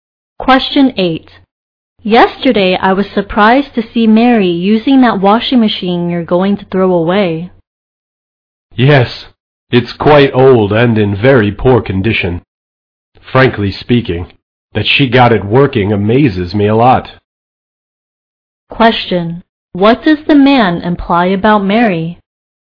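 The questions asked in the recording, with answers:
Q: What does the man imply about Mary?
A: He is amazed she got the old washing machine working.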